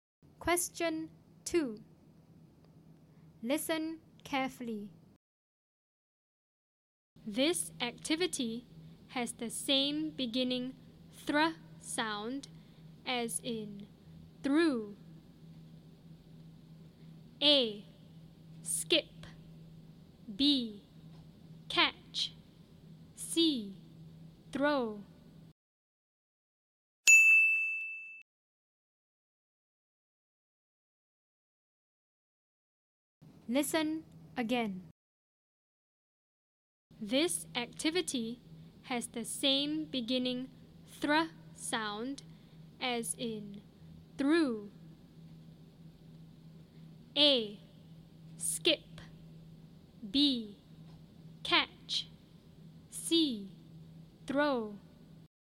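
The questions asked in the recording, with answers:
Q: This activity has the same beginning thr sound as in through.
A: C: Throw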